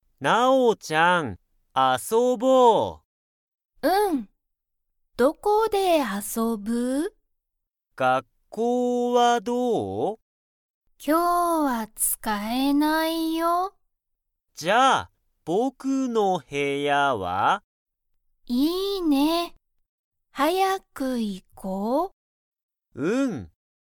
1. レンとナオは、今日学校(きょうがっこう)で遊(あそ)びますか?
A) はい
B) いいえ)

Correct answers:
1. いいえ)

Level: Level 1

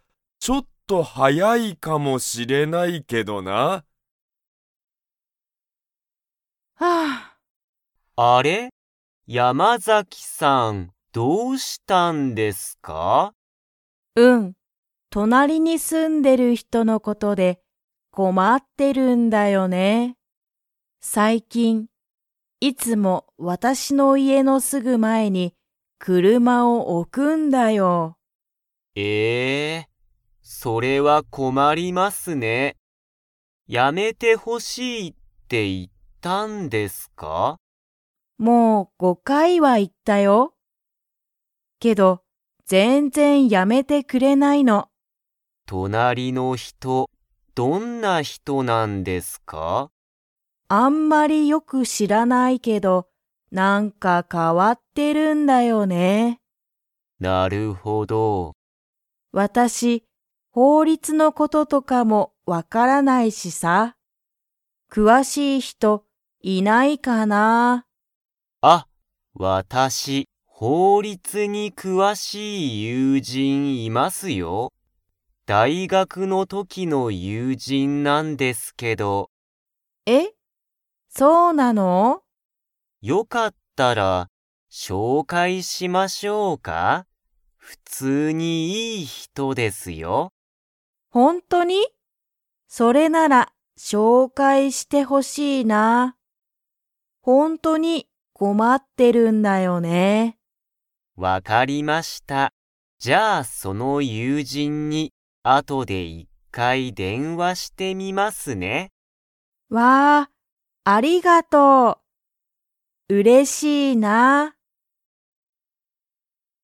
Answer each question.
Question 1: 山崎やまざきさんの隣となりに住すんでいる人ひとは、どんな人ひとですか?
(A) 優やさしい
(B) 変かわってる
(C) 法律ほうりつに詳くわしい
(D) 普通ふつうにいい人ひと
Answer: 変かわってる

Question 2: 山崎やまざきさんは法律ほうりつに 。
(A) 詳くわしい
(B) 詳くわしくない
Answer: 詳くわしくない

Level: Level 3

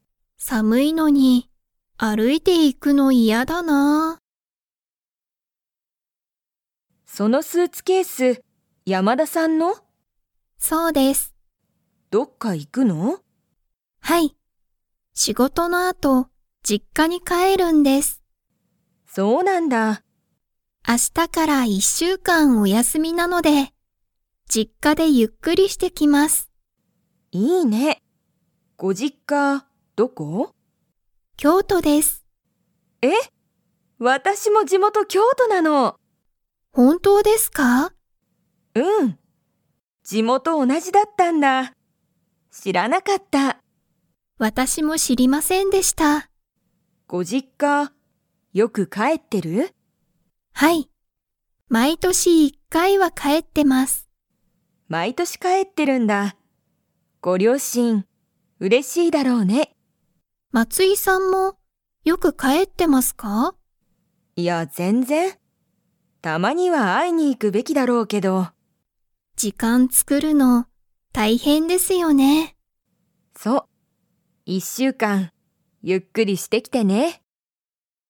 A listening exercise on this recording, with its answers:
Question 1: 山田(やまだ)さんは、仕事(しごと)の後(あと)、どこに行(い)きますか?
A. 東京(とうきょう)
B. 松井(まつい)さんの家(いえ)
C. 会社(かいしゃ)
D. 実家(じっか)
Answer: 実家(じっか)

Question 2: 松井(まつい)さんはよく実家(じっか)に 。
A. 帰(かえ)ってる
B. 帰(かえ)ってない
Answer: 帰(かえ)ってない

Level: Level 4

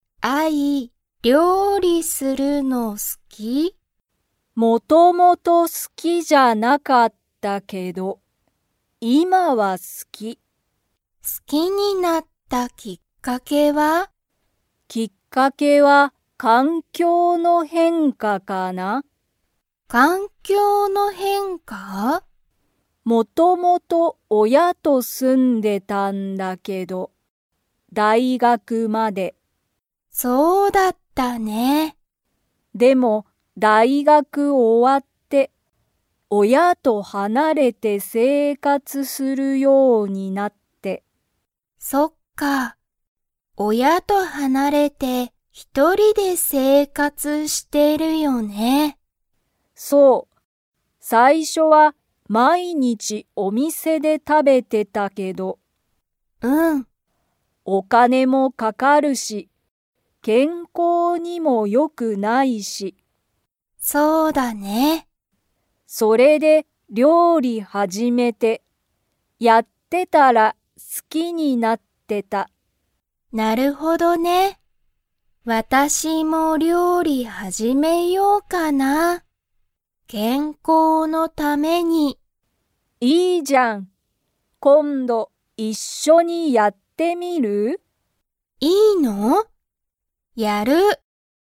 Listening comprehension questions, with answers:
Comprehension Quiz (Skip if you don't understand the conversation yet)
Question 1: アイは、元々もともと料理りょうりするのが 。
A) 好すきだった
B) 好すきじゃなかった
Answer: 好すきじゃなかった

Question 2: アイは、いつから親おやと離はなれて生活せいかつしていますか?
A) 子供こどもの頃ころから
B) 大学だいがく終おわってから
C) 仕事しごと辞やめてから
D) 料理りょうりしてから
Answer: 大学だいがく終おわってから

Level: Level 3

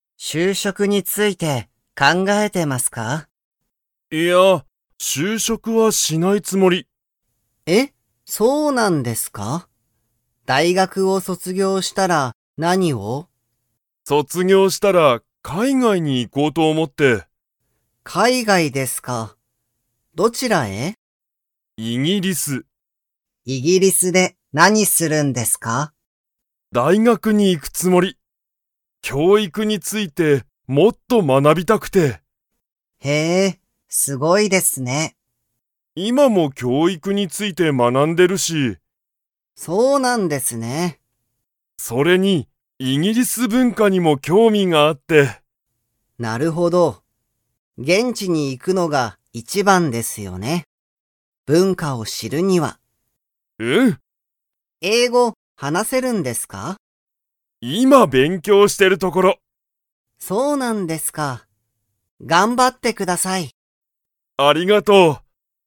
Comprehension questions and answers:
Comprehension Quiz (Skip if you don't understand the conversation yet)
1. 川口かわぐちさんは、大学だいがくを卒業そつぎょうしたら 。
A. 就職しゅうしょくする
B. 就職しゅうしょくしない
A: 就職しゅうしょくしない

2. 川口かわぐちさんは、今いま何なにについて学まなんでいますか?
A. 海外かいがい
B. 英語えいご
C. 文化ぶんか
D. 教育きょういく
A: 教育きょういく

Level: Level 4

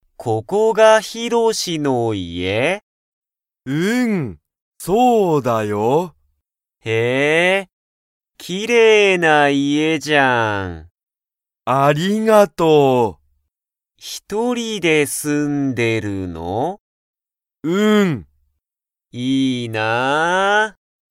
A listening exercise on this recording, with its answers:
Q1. ヒロシの家(いえ)は____。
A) 大変(たいへん)だ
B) すごい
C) きれいだ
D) 簡単(かんたん)だ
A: きれいだ

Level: Level 1

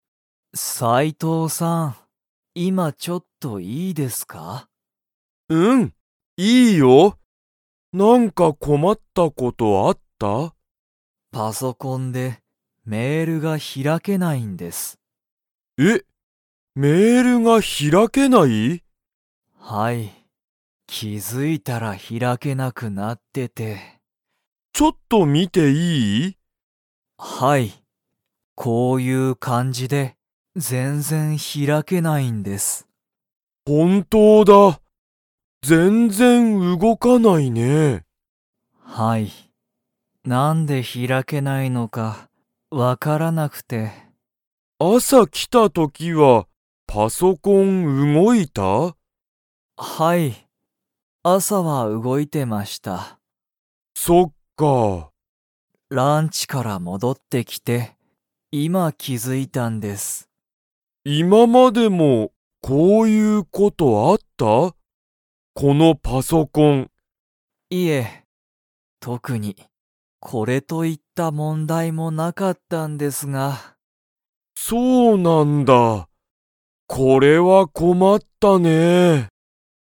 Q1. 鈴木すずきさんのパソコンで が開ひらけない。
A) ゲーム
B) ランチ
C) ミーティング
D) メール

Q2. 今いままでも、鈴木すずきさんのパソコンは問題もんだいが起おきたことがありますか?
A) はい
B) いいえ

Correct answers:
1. メール
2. いいえ

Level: Level 3

